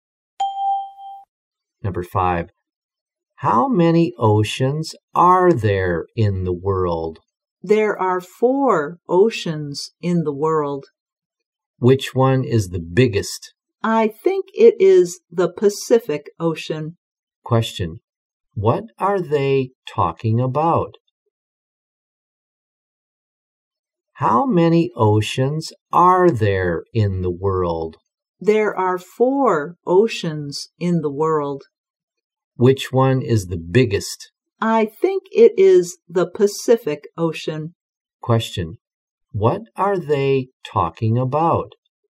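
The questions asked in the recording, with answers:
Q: What are they talking about?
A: The oceans in the world.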